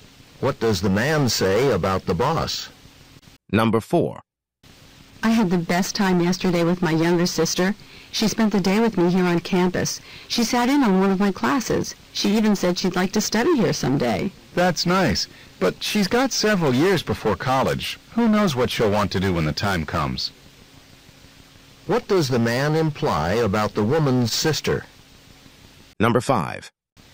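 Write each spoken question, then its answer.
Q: What does the man imply about the woman's sister?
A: She may change her mind about where to study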